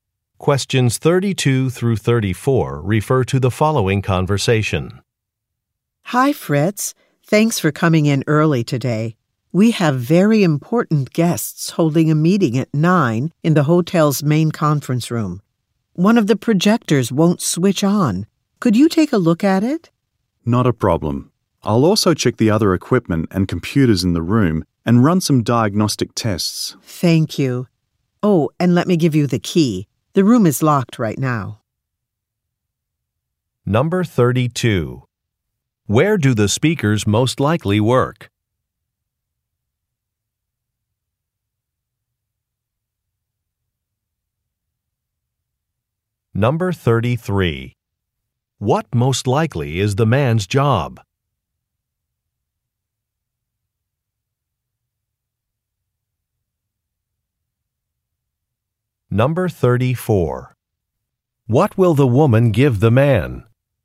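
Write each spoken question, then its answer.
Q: Where do the speakers most likely work?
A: At a hotel

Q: What most likely is the man's job?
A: Technician

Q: What will the woman give the man?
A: A key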